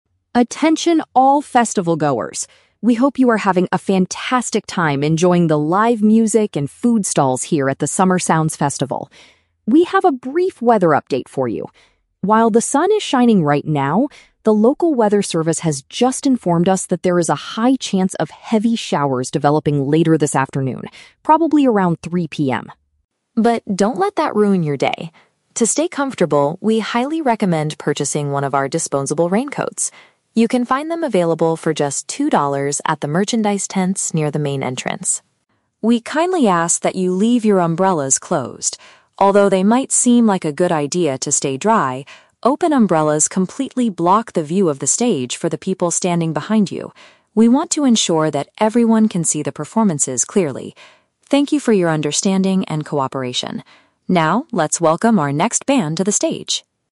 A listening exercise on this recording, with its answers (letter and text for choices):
Listen to an announcement over a loudspeaker at an outdoor festival and choose the correct answer (A, B, or C) for each question.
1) What is the main purpose of this announcement?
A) To inform the crowd about a delay in the music schedule.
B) To warn attendees about upcoming rain and offer a solution.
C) To advertise a new type of expensive festival clothing.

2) Where can the audience get the recommended wet-weather gear?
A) At the food stalls located right next to the stage.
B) From the local weather service building outside the festival.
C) At the official goods shops close to the front gate.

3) Why does the speaker tell the audience not to use umbrellas?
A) They will prevent other people from watching the show.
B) They are easily broken by the strong afternoon winds.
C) They are too dangerous to carry around in a large crowd.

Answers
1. B) To warn attendees about upcoming rain and offer a solution.
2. C) At the official goods shops close to the front gate.
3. A) They will prevent other people from watching the show.

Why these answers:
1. The announcer gives a "weather update" about "heavy showers" (upcoming rain) and recommends purchasing raincoats (offering a solution). Option (B) accurately summarizes this. Option (A) is a trap; music is mentioned, but the schedule is not delayed (the next band is coming to the stage right now). Option (C) is a trap; clothing (raincoats) is mentioned, but it is "disposable" and only "two dollars," not expensive.
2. The speaker says you can find raincoats at the "merchandise tents near the main entrance." Option (C) perfectly paraphrases this location ("official goods shops" = merchandise tents, "front gate" = main entrance). Option (A) is a trap; "food stalls" and "stage" are mentioned in the audio, but not as the place to buy raincoats. Option (B) is a trap; the "local weather service" is the source of the information, not a shop.
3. The announcer explains that open umbrellas "completely block the view of the stage for the people standing behind you." Option (A) uses synonyms to express this idea ("prevent other people from watching" = block the view). Option (B) is a trap; the weather is discussed, but wind breaking the umbrellas is never mentioned. Option (C) sounds like a logical safety rule for a festival, but it is not the reason given by the speaker.

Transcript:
Announcer: Attention all festival-goers! We hope you are having a fantastic time enjoying the live music and food stalls here at the Summer Sounds Festival. We have a brief weather update for you. While the sun is shining right now, the local weather service has just informed us that there is a high chance of heavy showers developing later this afternoon, probably around 3 PM.
But don't let that ruin your day! To stay comfortable, we highly recommend purchasing one of our disposable raincoats. You can find them available for just two dollars at the merchandise tents near the main entrance.
We kindly ask that you leave your umbrellas closed. Although they might seem like a good idea to stay dry, open umbrellas completely block the view of the stage for the people standing behind you. We want to ensure that everyone can see the performances clearly. Thank you for your understanding and cooperation. Now, let's welcome our next band to the stage!